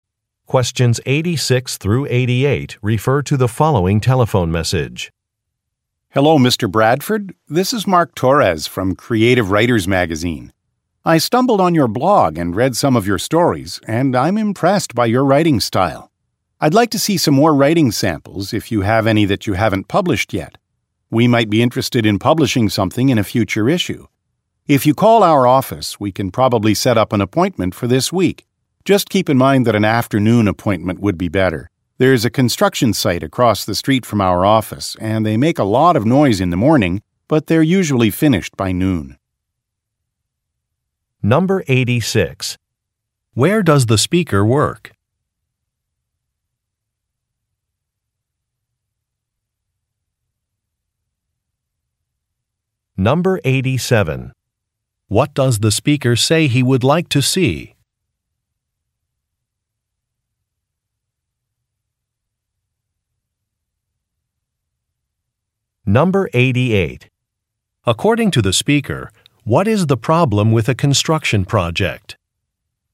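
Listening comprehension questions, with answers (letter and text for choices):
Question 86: Where does the speaker work?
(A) At a university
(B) At a library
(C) At a publishing company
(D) At an art gallery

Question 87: What does the speaker say he would like to see?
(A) An artist's biography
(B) A calendar of events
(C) Some blueprints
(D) Some writing samples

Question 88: According to the speaker, what is the problem with a construction project?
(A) It blocks his view.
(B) It is very noisy.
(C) It has increased traffic.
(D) It is over budget.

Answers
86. (C) At a publishing company
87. (D) Some writing samples
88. (B) It is very noisy.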